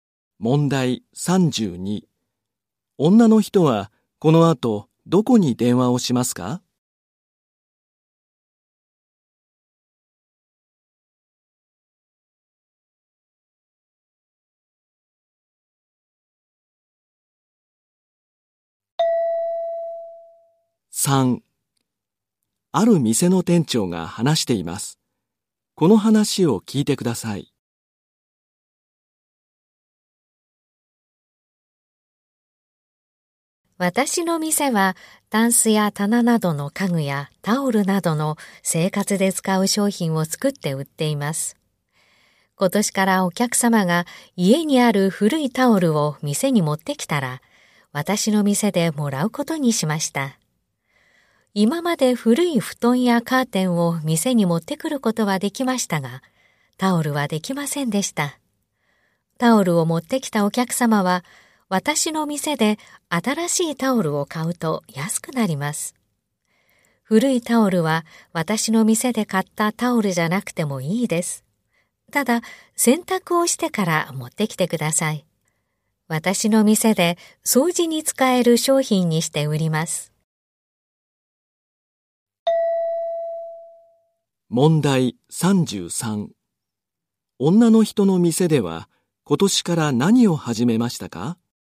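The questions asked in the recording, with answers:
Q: 女の人の店では今年から何を始めましたか?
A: 客の古いタオルをもらうこと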